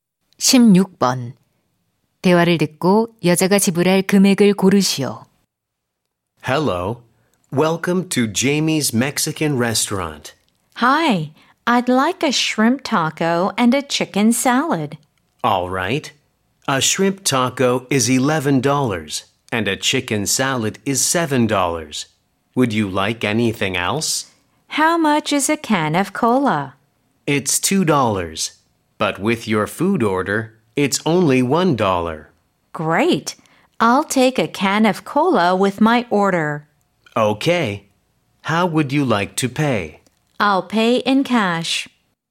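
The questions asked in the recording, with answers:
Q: 대화를 듣고 여자가 지불할 금액을 고르시오.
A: $19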